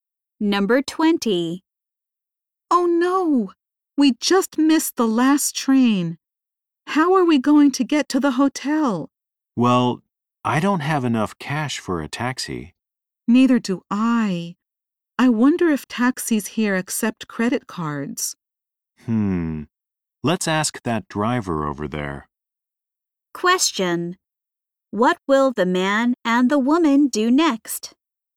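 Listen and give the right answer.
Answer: Ask a taxi driver if he accepts credit cards.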